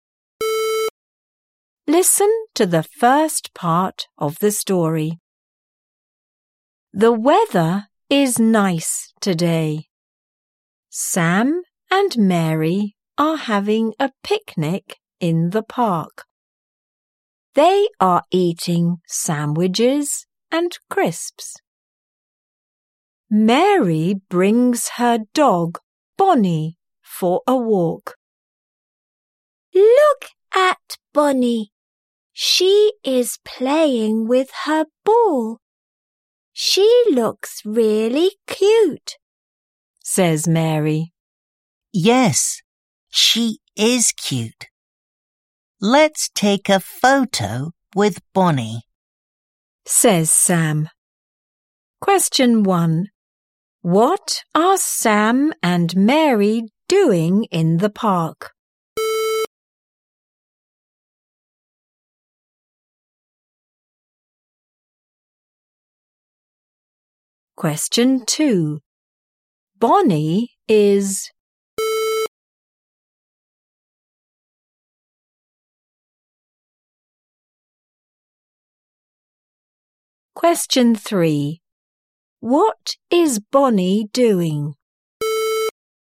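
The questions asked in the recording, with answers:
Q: What are Sam and Mary doing in the park?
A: Having a picnic

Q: What is Bonnie doing?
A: Playing with her ball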